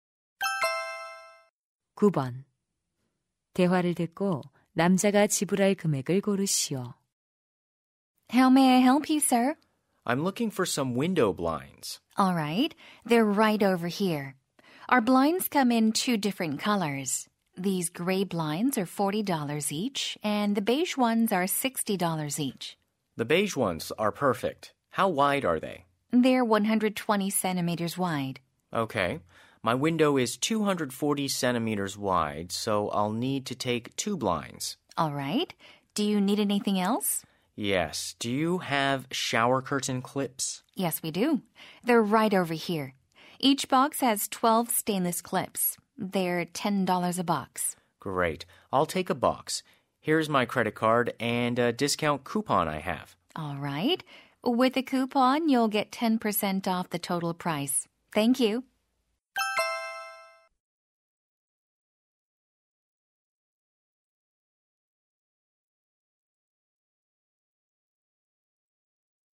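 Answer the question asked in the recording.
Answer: $117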